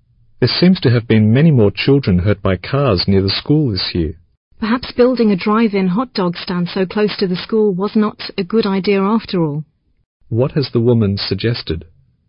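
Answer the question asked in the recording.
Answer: The drive-in hot dog stand near the school causes the accidents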